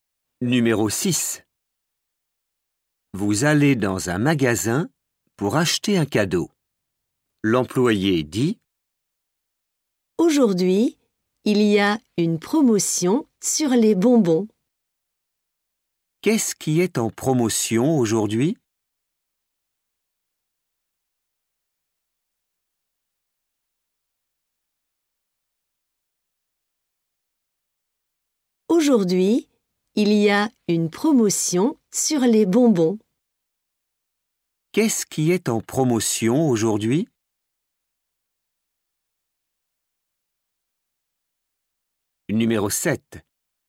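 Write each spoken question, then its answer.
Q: Qu'est-ce qui est en promotion aujourd'hui?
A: les bonbons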